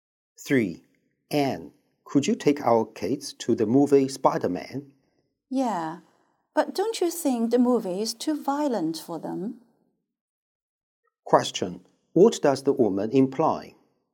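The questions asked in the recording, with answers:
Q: What does the woman imply?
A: The movie may be too violent for the kids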